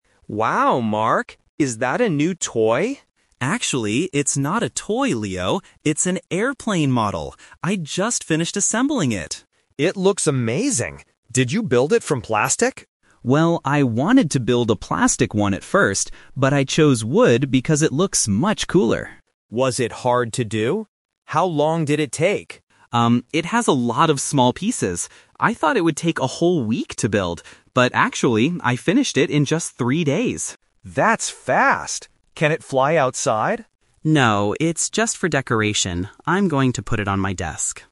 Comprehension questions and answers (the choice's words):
Listen to two brothers talking about an airplane model. Choose the correct answer (A, B, or C).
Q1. What material is Mark's airplane model made of?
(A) Plastic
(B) Wood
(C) Metal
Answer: Wood

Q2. How long did it take Mark to finish the model?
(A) Three days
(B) One week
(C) One month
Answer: Three days

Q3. What is Mark going to do with the airplane now?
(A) Fly it outside.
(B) Give it to his brother.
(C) Put it on his desk.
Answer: Put it on his desk.

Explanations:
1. Mark clearly states, "...I chose wood because it looks much cooler."
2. Mark says, "But actually, I finished it in just three days."
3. Mark explains that it is just for decoration and says, "I'm going to put it on my desk."

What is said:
Leo: Wow, Mark! Is that a new toy?
Mark: Actually, it's not a toy, Leo. It's an airplane model. I just finished assembling it!
Leo: It looks amazing. Did you build it from plastic?
Mark: Well, I wanted to build a plastic one at first, but I chose wood because it looks much cooler.
Leo: Was it hard to do? How long did it take?
Mark: Um, it has a lot of small pieces. I thought it would take a whole week to build. But actually, I finished it in just three days.
Leo: That's fast! Can it fly outside?

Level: A2